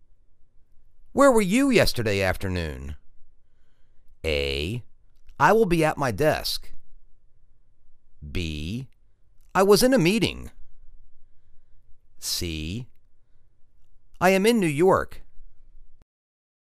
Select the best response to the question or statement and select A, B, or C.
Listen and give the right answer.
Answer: I was in a meeting.